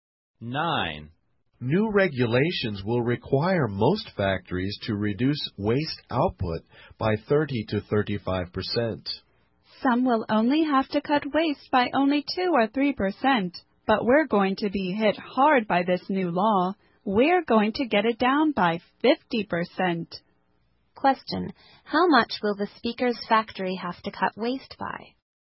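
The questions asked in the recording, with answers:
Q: how much will the speaker's factory have to cut waste by?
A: 50%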